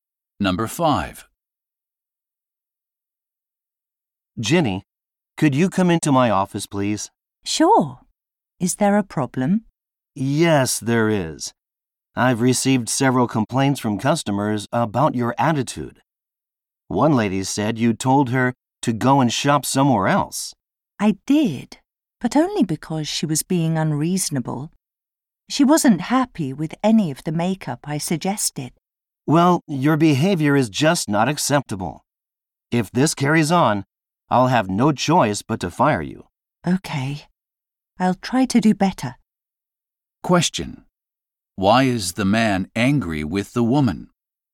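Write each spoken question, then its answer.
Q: Why is the man angry with the woman?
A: Customers complained about her rude attitude.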